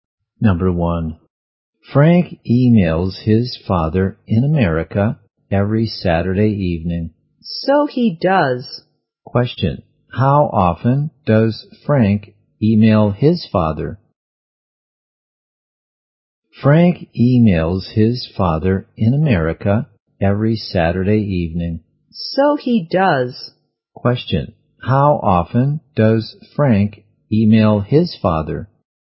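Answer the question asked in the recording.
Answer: Once a week (every Saturday evening)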